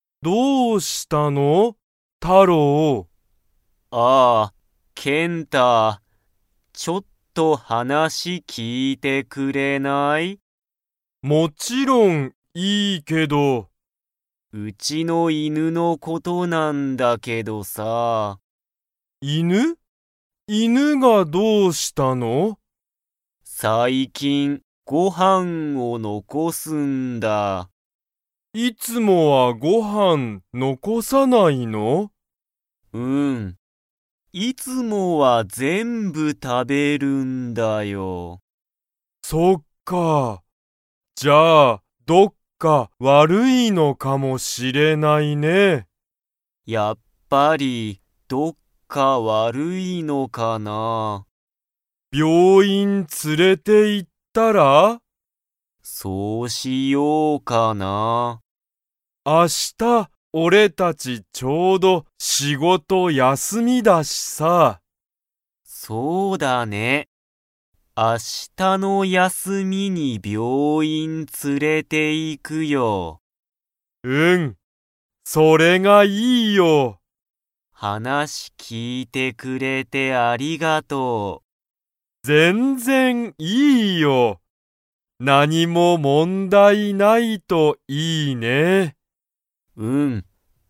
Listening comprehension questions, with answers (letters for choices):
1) タロウの犬(いぬ)は、最近(さいきん)、____を残(のこ)す。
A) ご飯(はん)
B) 病院(びょういん)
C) 仕事(しごと)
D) 休(やす)み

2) タロウは明日(あした)、犬(いぬ)を病院(びょういん)に連(つ)れていきますか?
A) はい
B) いいえ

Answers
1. A
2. A

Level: Level 2